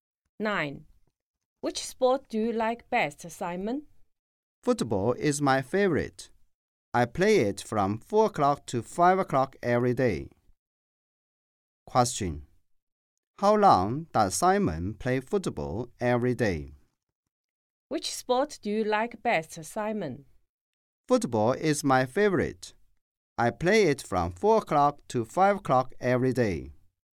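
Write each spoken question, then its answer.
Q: How long does Simon play football every day?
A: One hour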